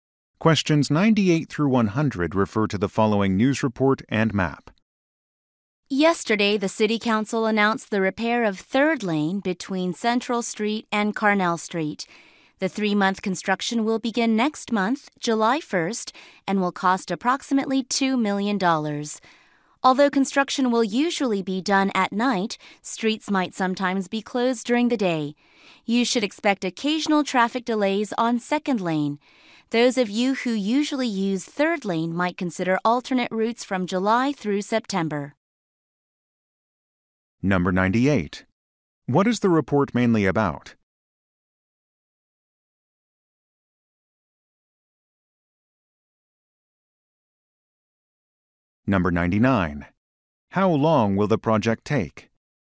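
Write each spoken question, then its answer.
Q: What is the report mainly about?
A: Repair of Third Lane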